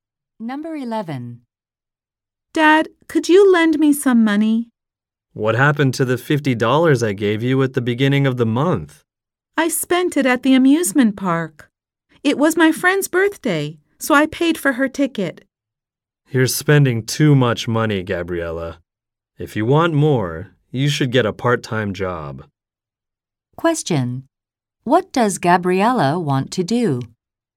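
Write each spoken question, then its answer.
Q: What does Gabriella want to do?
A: Borrow money from her dad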